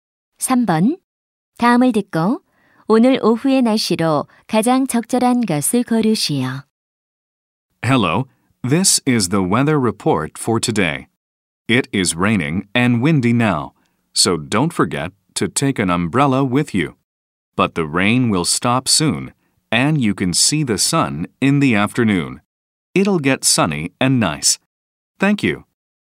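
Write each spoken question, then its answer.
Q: 다음을 듣고 오늘 오후의 날씨로 가장 적절한 것을 고르시오.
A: 맑음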